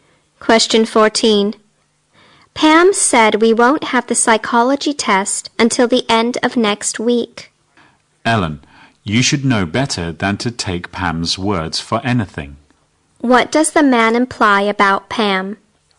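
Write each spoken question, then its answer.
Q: What does the man imply about Pam?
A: What Pam says can't be trusted.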